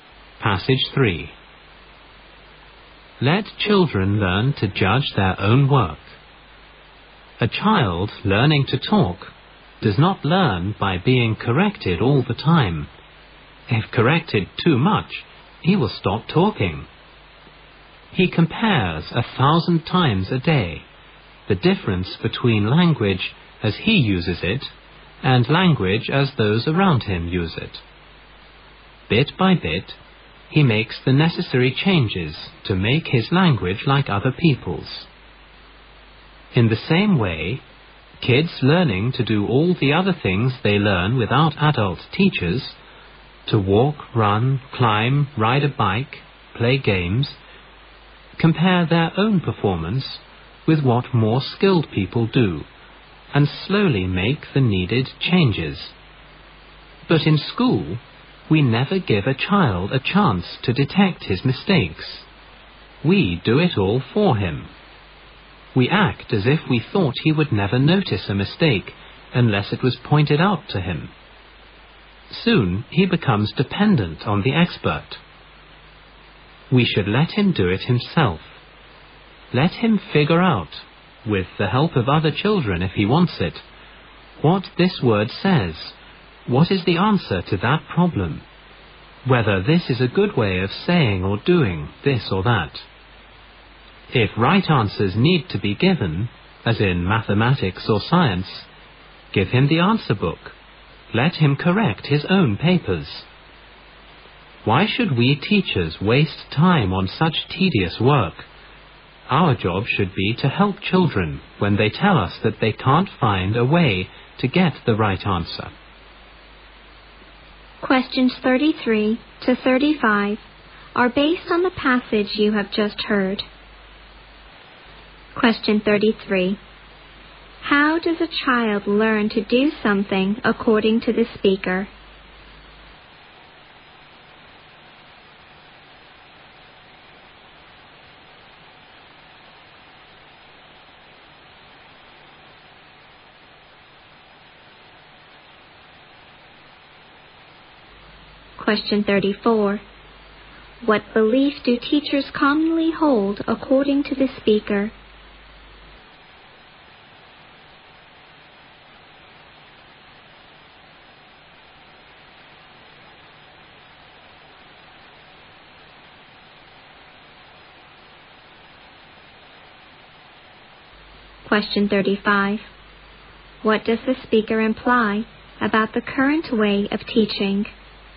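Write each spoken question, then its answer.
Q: How does a child learn to do something according to the speaker?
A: By comparing his performance with that of more skilled people and slowly making changes

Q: What belief do teachers commonly hold according to the speaker?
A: Children won't notice mistakes unless someone points them out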